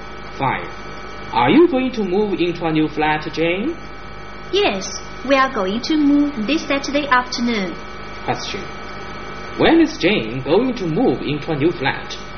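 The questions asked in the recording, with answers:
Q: When is Jane going to move into a new flat?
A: This Saturday afternoon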